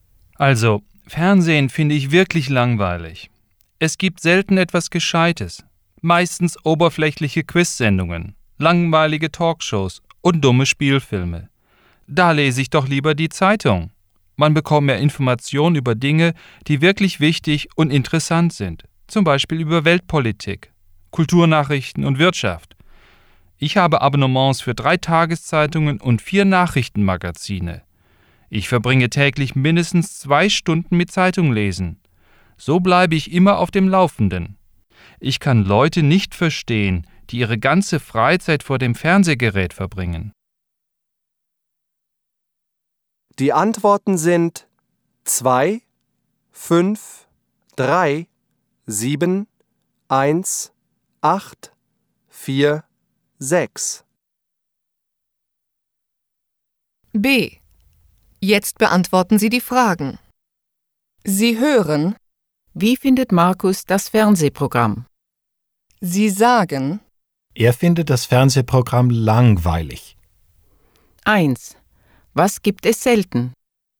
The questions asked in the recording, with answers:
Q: Was gibt es selten?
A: Es gibt selten etwas Gescheites.